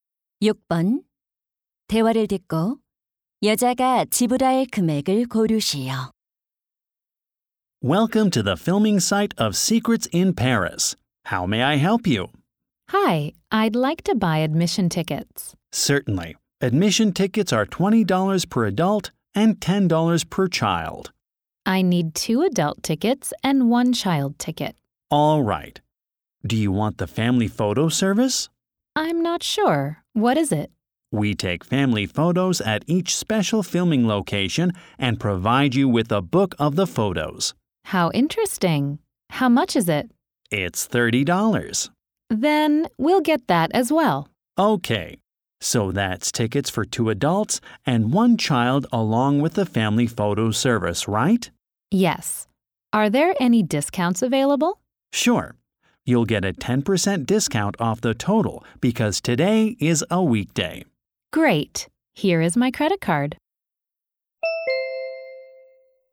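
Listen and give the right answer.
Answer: 72달러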